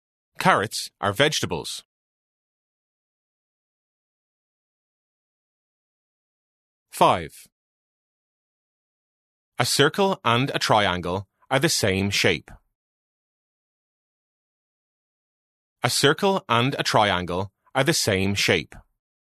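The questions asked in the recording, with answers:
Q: A circle and a triangle are the same shape.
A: False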